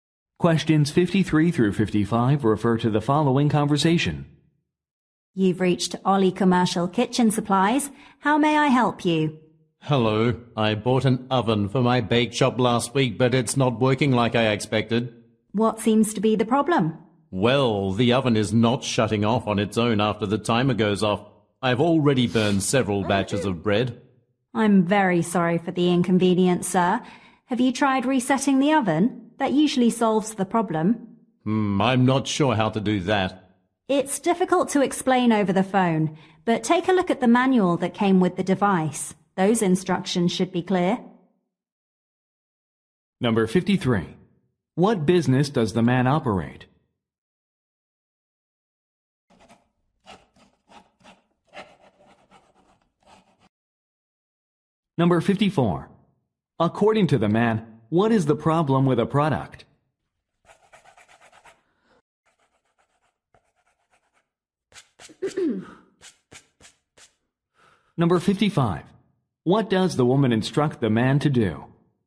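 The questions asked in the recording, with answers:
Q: What business does the man operate?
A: A bake shop

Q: According to the man, what is the problem with a product?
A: The oven does not shut off after the timer goes off

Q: What does the woman instruct the man to do?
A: Look at the manual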